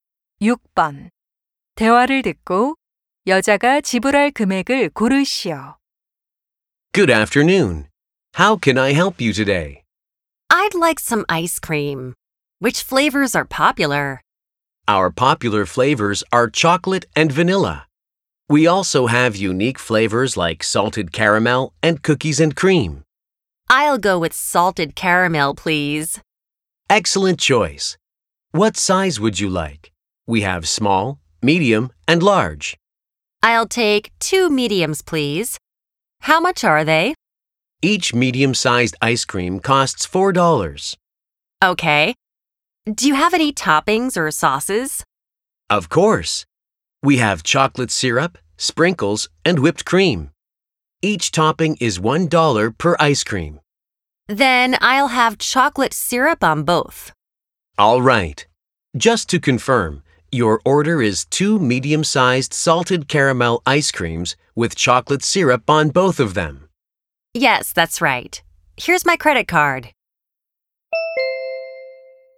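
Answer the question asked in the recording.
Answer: $10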